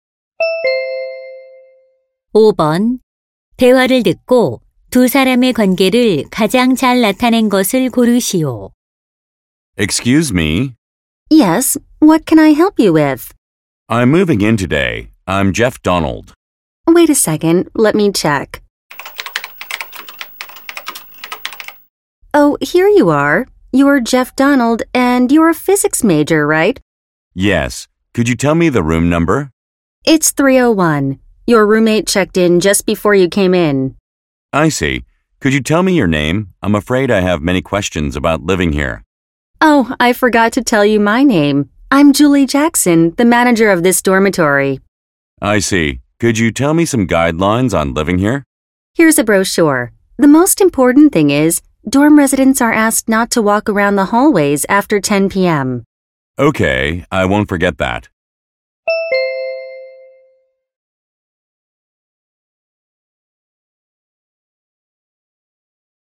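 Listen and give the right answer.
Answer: 기숙사 관리자 - 입주 학생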